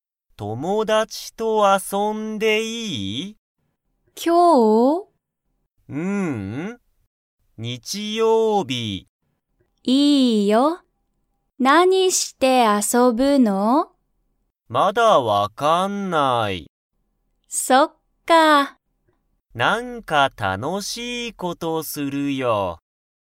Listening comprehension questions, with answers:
しんごは友達(ともだち)と、何(なに)か____事(こと)をする。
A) 日曜日(にちようび)の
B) 知(し)っている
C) 遊(あそ)ばない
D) 楽(たの)しい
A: D) 楽(たの)しい

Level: Level 1

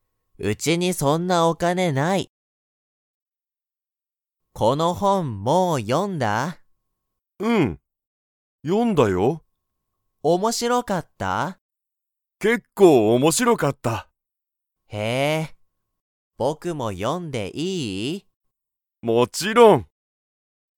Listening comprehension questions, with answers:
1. その本(ほん)は、____。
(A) 結構面白(けっこうおもしろ)かった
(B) 全然面白(ぜんぜんおもしろ)くなかった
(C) 少(すこ)し面白(おもしろ)い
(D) あまり面白(おもしろ)くない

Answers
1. (A) 結構面白(けっこうおもしろ)かった

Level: Level 1

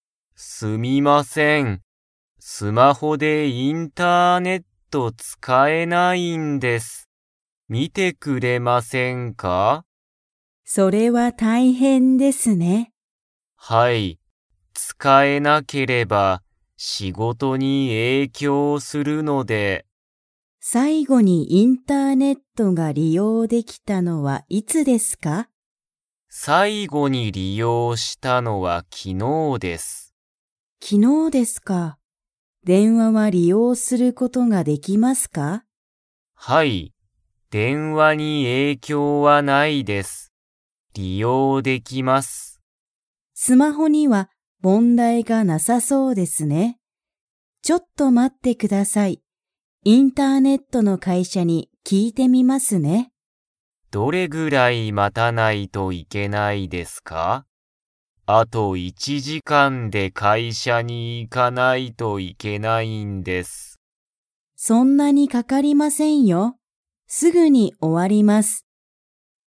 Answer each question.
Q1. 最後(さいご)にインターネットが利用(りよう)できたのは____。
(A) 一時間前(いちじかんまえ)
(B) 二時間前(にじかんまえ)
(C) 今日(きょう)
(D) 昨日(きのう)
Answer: (D) 昨日(きのう)

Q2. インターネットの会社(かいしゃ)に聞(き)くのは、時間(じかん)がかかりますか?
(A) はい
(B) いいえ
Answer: (B) いいえ

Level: Level 2

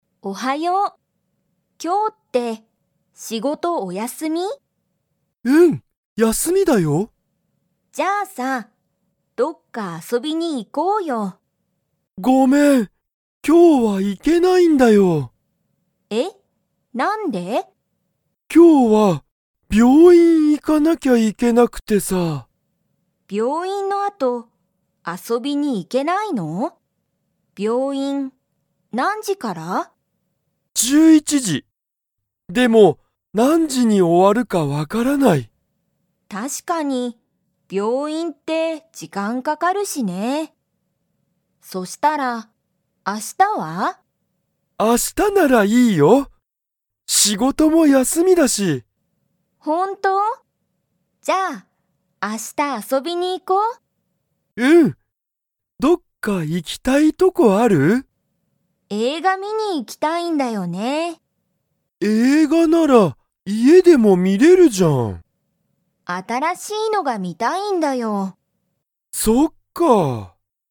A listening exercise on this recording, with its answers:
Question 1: サキとユウヤは、今日遊きょうあそびに行いきますか?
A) はい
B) いいえ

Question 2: ユウヤの病院びょういんは、____からだ。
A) 9時くじ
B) 10時じゅうじ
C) 11時じゅういちじ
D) 12時じゅうにじ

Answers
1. B) いいえ
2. C) 11時じゅういちじ

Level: Level 2

